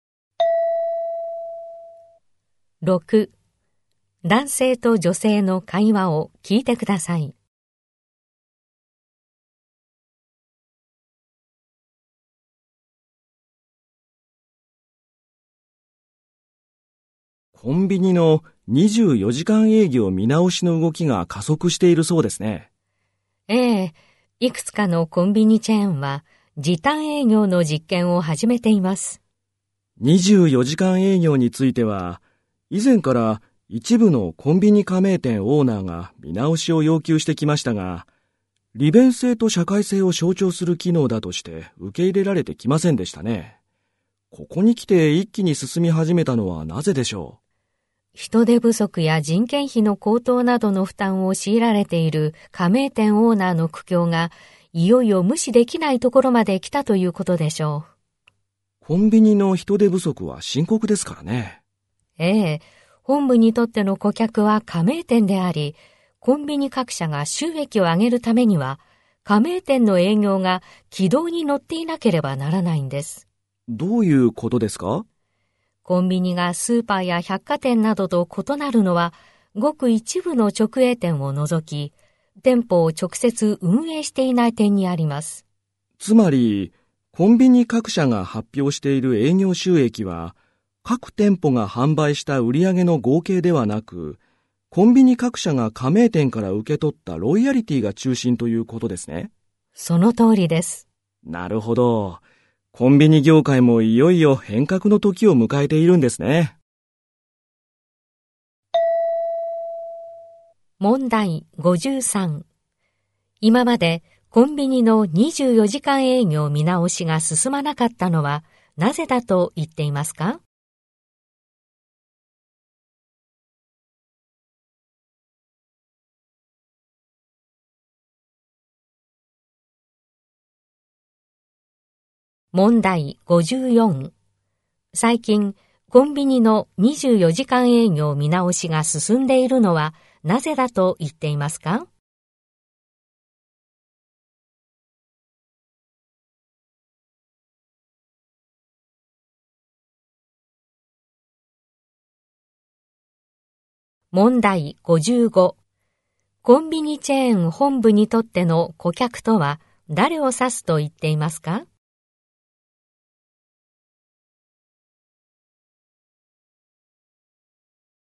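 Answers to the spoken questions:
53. 利便性と社会性を象徴する機能だとされてきたから
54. 人手不足や人件費高騰による加盟店オーナーの苦境が無視できなくなったから
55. 加盟店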